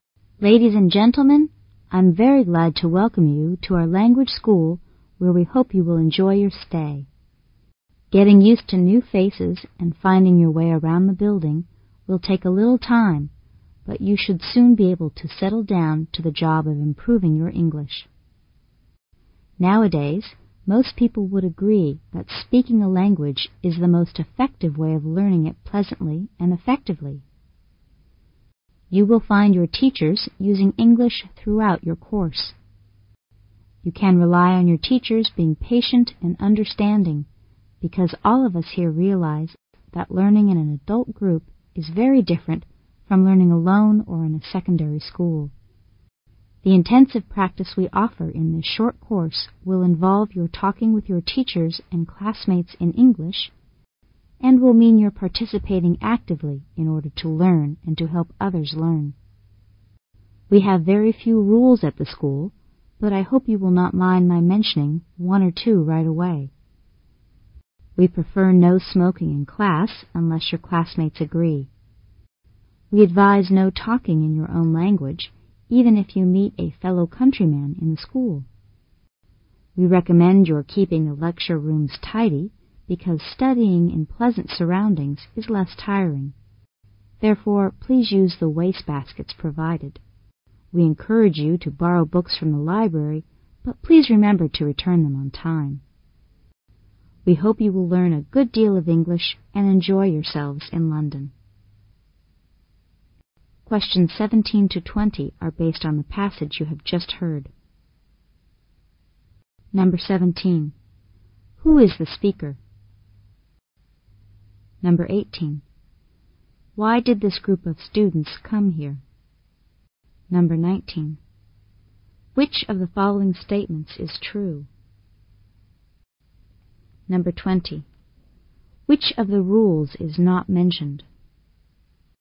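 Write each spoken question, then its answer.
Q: Why did this group of students come here?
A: To improve their English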